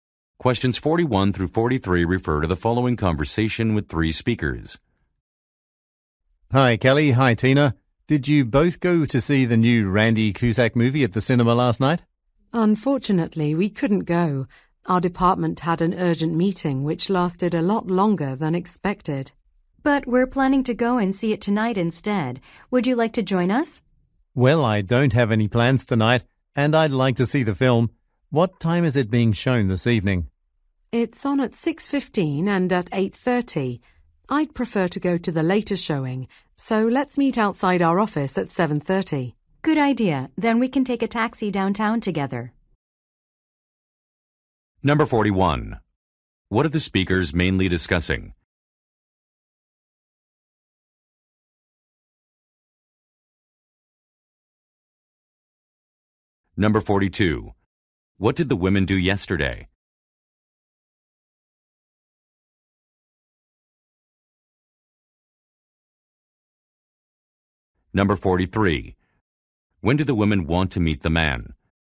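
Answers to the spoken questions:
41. Going to see a movie
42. Attended a long department meeting
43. At 7:30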